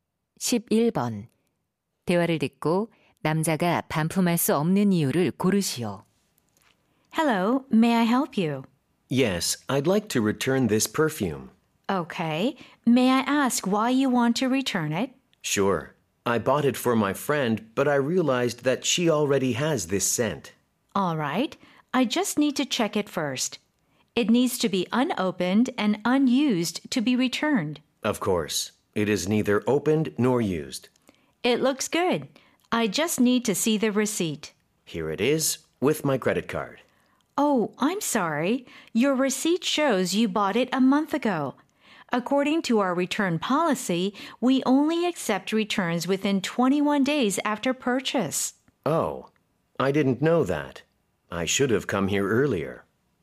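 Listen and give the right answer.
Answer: 반품 기한(구매 후 21일)이 지나서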